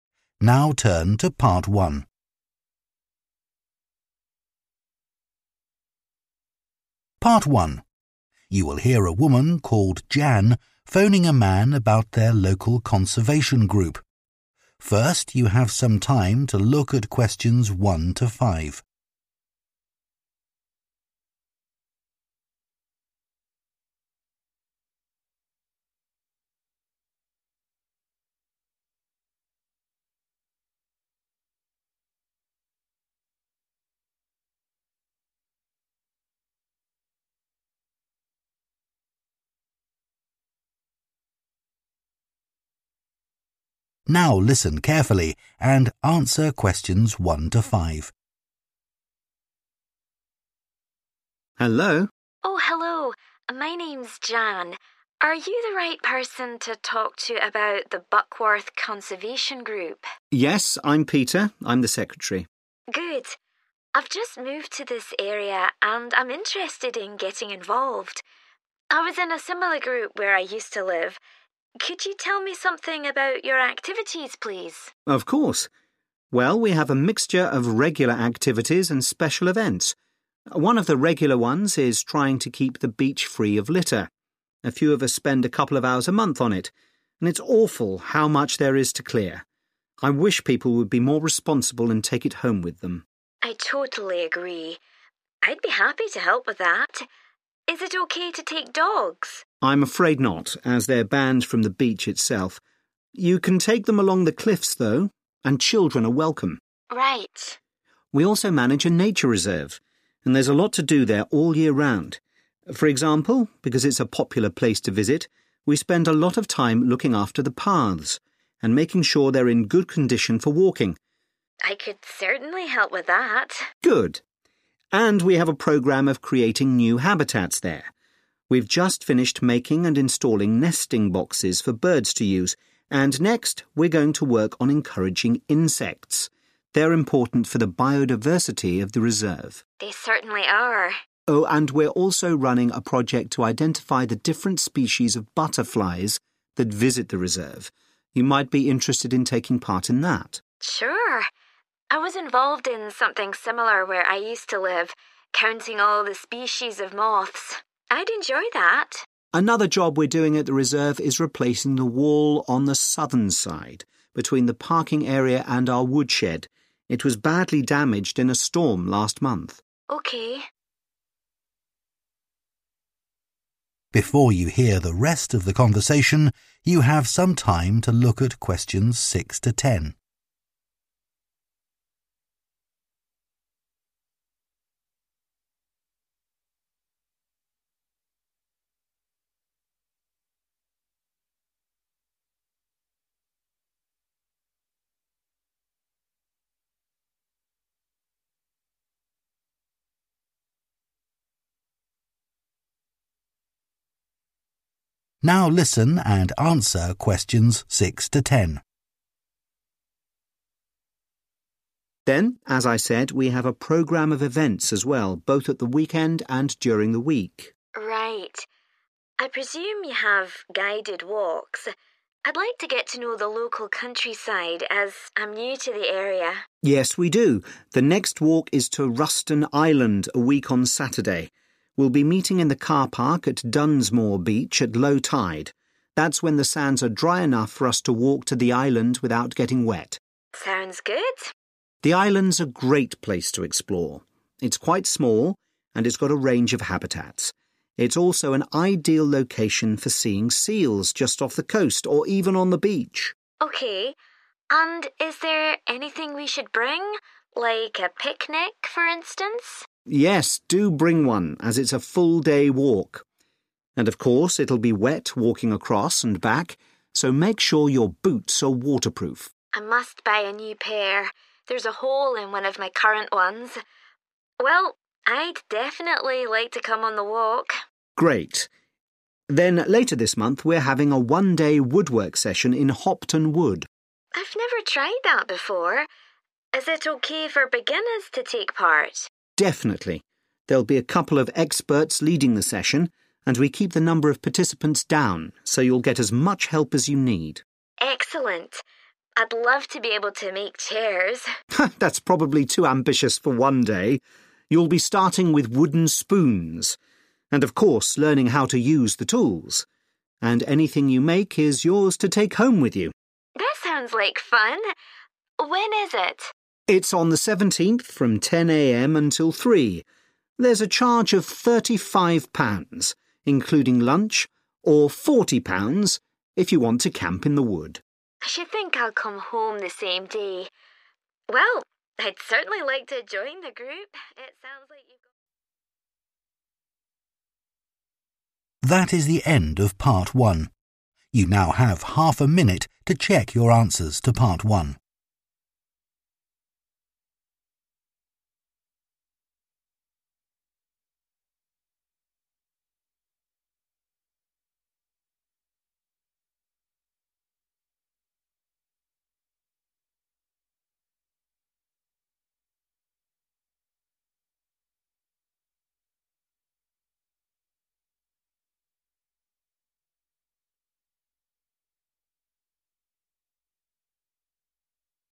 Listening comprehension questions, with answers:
Complete the notes below. Write ONE WORD AND/OR A NUMBER for each answer.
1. making sure the beach does not have _____ on it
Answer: litter

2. no _____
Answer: dogs

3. next task is taking action to attract _____ to the place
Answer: insects

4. identifying types of _____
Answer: butterflies

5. building a new _____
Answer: wall

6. walk across the sands and reach the _____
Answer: island

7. wear appropriate _____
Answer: boots

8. suitable for _____ to participate in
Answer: beginners

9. making _____ out of wood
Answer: spoons

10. cost of session (no camping): £ _____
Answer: 35 / thirty five

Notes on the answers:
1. One of the regular ones is trying to keep the beach free of litter. Excerpt/Transcript Explanation: The transcript mentions that one of the regular activities of the Buckworth Conservation Group is ensuring that the beach does not have litter on it. Answer Explanation: The answer 'litter' refers to trash or waste that is left on the beach, which the group works to keep the beach free of. Reason For Correctness: The correct answer matches the concept of keeping the beach clean and free of trash, as indicated in the excerpt where the group is described as trying to keep the beach free of litter.
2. I'd be happy to help with that. Is it OK to take dogs? Excerpt/Transcript Explanation: The transcript mentions a question about whether dogs are allowed to participate. Answer Explanation: The answer 'dogs' indicates that dogs are being asked about in the question. Reason For Correctness: The correct answer matches the topic of dogs being inquired about, fitting with what is being discussed in the excerpt.
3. next we're going to work on encouraging insects Excerpt/Transcript Explanation: The transcript is mentioning that the next task for the nature reserve involves taking action to attract insects to the place. Answer Explanation: The answer refers to small creatures like ants, bees, and flies that are important for the environment. Reason For Correctness: The correct answer matches with the information provided in the excerpt since insects play a crucial role in ecosystems and are likely being targeted for conservation efforts at the nature reserve.
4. Oh, and we're also running a project to identify the different species of butterflies that visit the reserve. Excerpt/Transcript Explanation: The transcript mentions a project to find out the different kinds of butterflies that come to the reserve. Answer Explanation: The answer is 'butterflies', which are colorful insects often found in nature reserves. Reason For Correctness: The correct answer matches the description of identifying butterfly species in the nature reserve as mentioned in the excerpt.
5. Another job we're doing at the reserve is replacing the wall on the southern side Excerpt/Transcript Explanation: The transcript mentions that a wall on the southern side of the reserve is being replaced. Answer Explanation: The answer 'wall' refers to a structure that separates areas or provides protection. Reason For Correctness: The correct answer matches the context of the excerpt where it talks about replacing a 'wall', indicating that the task involves constructing or repairing this structure at the reserve.
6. that's when the sands are dry enough for us to walk to the island without getting wet. Excerpt/Transcript Explanation: The transcript talks about walking on the sands to reach a specific location without getting wet. Answer Explanation: The answer 'island' refers to a piece of land surrounded by water. In this context, they are walking to an island. Reason For Correctness: The correct answer is 'island' because the excerpt mentions walking to a location without getting wet, implying it is surrounded by water like an island. Therefore, 'island' fits the context perfectly.
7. And of course it'll be wet walking across and back, so make sure your boots are waterproof. Excerpt/Transcript Explanation: The transcript is saying that it will be wet while walking across and back. It recommends ensuring that the shoes you wear are able to resist water. Answer Explanation: The answer refers to a type of footwear that is able to keep your feet dry when walking through wet areas. Reason For Correctness: The correct answer 'boots' is appropriate because waterproof boots are suitable for walking over wet surfaces, like the beach mentioned in the notes where participants will be walking across and back on damp sands during the event.
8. Is it OK for beginners to take part? Excerpt/Transcript Explanation: The transcript is asking if people who are new to woodworking can join the session. Answer Explanation: The answer suggests that beginners can participate in the woodworking session. Reason For Correctness: The correct answer matches the question asked in the excerpt, indicating that those new to woodworking are welcome to join the session.
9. You'll be starting with wooden spoons, and of course learning how to use the tools. Excerpt/Transcript Explanation: The transcript mentions that participants in the woodwork session will start by making wooden spoons and learn how to use the tools. Answer Explanation: The answer 'spoons' refers to the items that participants will be making out of wood during the woodwork session. Reason For Correctness: The correct answer is 'spoons' because it aligns with the activity of making items out of wood, specifically mentioned in the excerpt as starting with wooden spoons.
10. There's a charge of £35, including lunch, or £40 if you want to camp in the wood. Excerpt/Transcript Explanation: The transcript mentions that there is a cost associated with the woodwork session, which is £35 and includes lunch. If someone wants to camp in the wood, the cost increases to £40. Answer Explanation: The answer '35' or 'thirty five' refers to the cost of the woodwork session without camping, which is £35. Reason For Correctness: The correct answer matches the cost mentioned in the excerpt for participating in the woodwork session without camping. It directly correlates to the information provided in the transcript about the session cost.

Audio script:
PETER: Hello?
JAN: Oh hello. My name's Jan. Are you the right person to talk to about the Buckworth Conservation Group?
PETER: Yes, I'm Peter. I'm the secretary.
JAN: Good. I've just moved to this area, and I'm interested in getting involved. I was in a similar group where I used to live. Could you tell me something about your activities, please?
PETER: Of course. Well, we have a mixture of regular activities and special events. One of the regular ones is trying to keep the beach free of litter. A few of us spend a couple of hours a month on it, and it's awful how much there is so clear. I wish people would be more responsible and take it home with them.
JAN: I totally agree. I'd be happy to help with that. Is it OK to take dogs?
PETER: I'm afraid not, as they're banned from the beach itself. You can take them along the cliffs, though. And children are welcome.
JAN: Right.
PETER: We also manage a nature reserve, and there's a lot to do there all year round. For example, because it's a popular place to visit, we spend a lot of time looking after the paths and making sure they're in good condition for walking.
JAN: I could certainly help with that.
PETER: Good. And we have a programme of creating new habitats there. We're just finished making and installing nesting boxes for birds to use, and next we're going to work on encouraging insects – they're important for the biodiversity of the reserve.
JAN: They certainly are.
PETER: Oh, and we're also running a project to identify the different species of butterflies that visit the reserve. You might be interested in taking part in that.
JAN: Sure. I was involved in something similar where I used to live, counting all the species of months. I'd enjoy that.
PETER: Another job we're doing at the reserve is replacing the wall on the southern side, between the parking area and our woodshed. It was badly damaged in a storm last month.
JAN: OK.
PETER: Then as I said, we have a programme of events as well, both at the weekend, and during the week.
JAN: Right. I presume you have guided walks? I'd like to get to know the local countryside, as I'm new to the area.
PETER: Yes, we do. The next walk is to Ruston Island, a week on Saturday. We'll be meeting in the car park at Dunsmore Beach at low tide – that's when the sands are dry enough for us to walk to the island without getting wet.
JAN: Sounds good.
PETER: The island's a great place to explore. It's quite small, and it's got a range of habitats. It's also an ideal location for seeing seals just off the coast, or even on the beach.
JAN: OK. And is there anything we should bring, like a picnic, for instance?
PETER: Yes, do bring one, as it's a full-day walk. And of course it'll be wet walking across and back, so make sure your boots are waterproof.
JAN: I must buy a new pair – there's a hole in one of my current ones! Well, I'd definitely like to come on the walk.
PETER: Great. Then later this month we're having a one-day woodwork session in Hopton Wood.
JAN: I've never tried that before. Is it OK for beginners to take part?
PETER: Definitely. There'll be a couple of experts leading the session, and we keep the number of participants down, so you'll get as much help as you need.
JAN: Excellent! I'd love to be able to make chairs.
PETER: That's probably too ambitious for one day! You'll be starting with wooden spoons, and of course learning how to use the tools. And anything you make is yours to take home with you.
JAN: That sounds like fun. When is it?
PETER: It's on the 17th, from 10 a.m. until 3. There's a charge of £35, including lunch, or £40 if you want to camp in the wood.
JAN: I should think I'll come home the same day. Well, I'd certainly like to join the group.